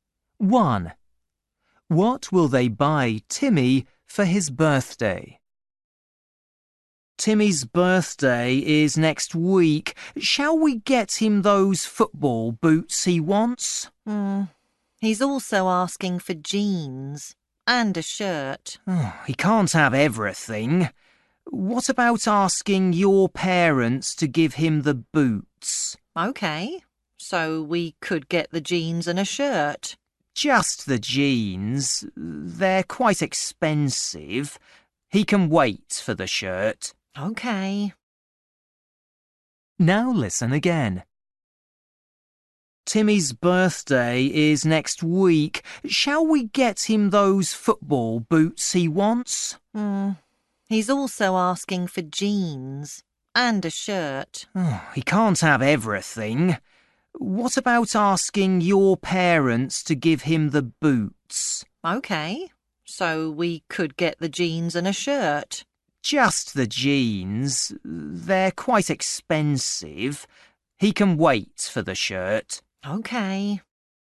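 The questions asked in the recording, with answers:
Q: What will they buy Timmy for his birthday?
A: jeans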